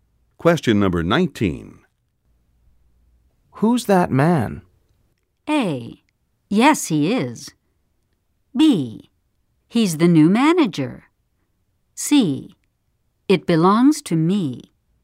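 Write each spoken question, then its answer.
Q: Who's that man?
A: B: He's the new manager.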